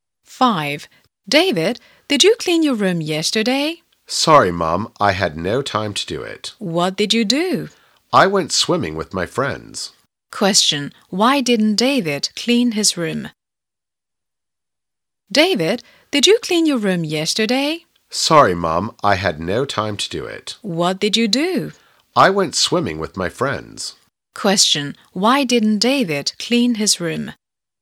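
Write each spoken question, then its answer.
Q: Why didn't David clean his room?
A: He went swimming with his friends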